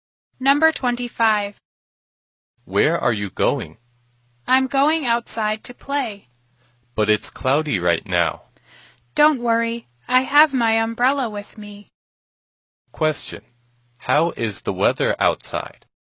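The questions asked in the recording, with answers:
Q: Question. How is the weather outside?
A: It's cloudy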